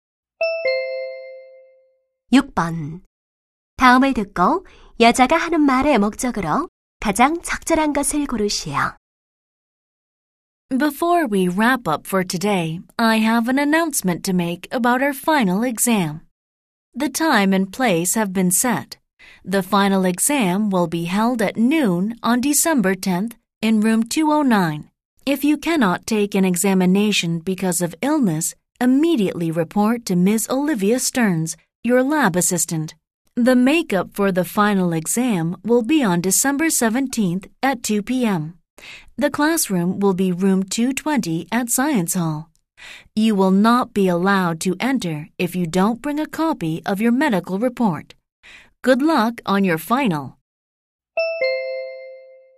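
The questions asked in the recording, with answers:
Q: 다음을 듣고 여자가 하는 말의 목적으로 가장 적절한 것을 고르시오.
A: 기말고사 일정 안내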